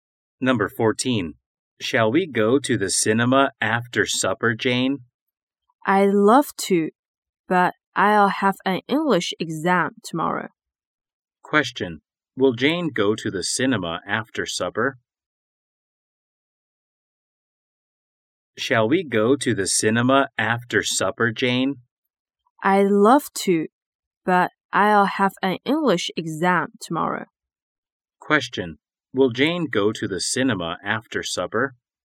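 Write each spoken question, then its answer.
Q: Will Jane go to the cinema after supper?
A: No, she will have an English exam tomorrow.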